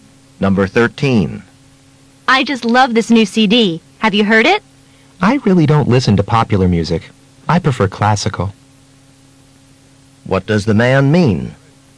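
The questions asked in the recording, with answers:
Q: What does the man mean?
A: He hasn't heard it; he prefers classical music.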